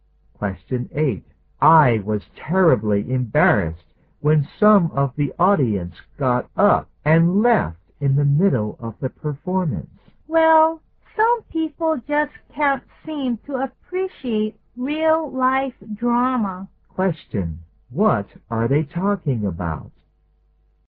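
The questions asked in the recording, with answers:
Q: What are they talking about?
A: A play (drama performance) that some of the audience walked out of.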